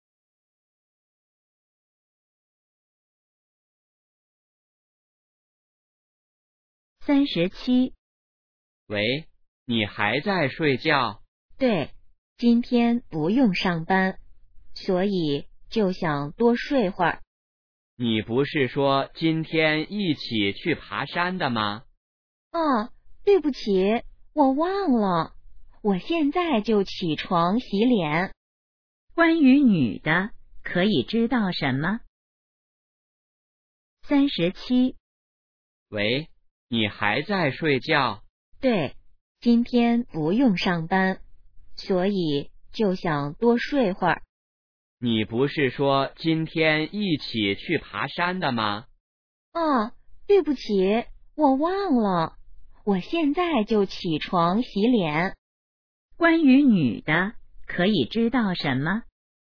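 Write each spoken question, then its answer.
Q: 关于女的,可以知道什么?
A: 她忘了今天去爬山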